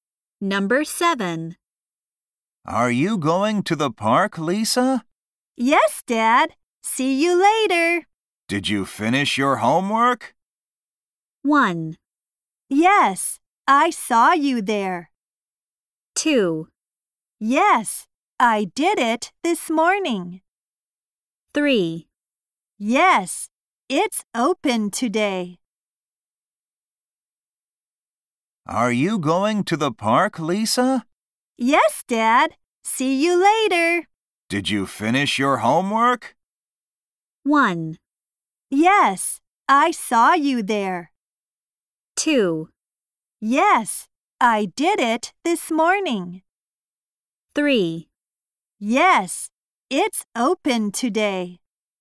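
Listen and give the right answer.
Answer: 2: Yes, I did it this morning.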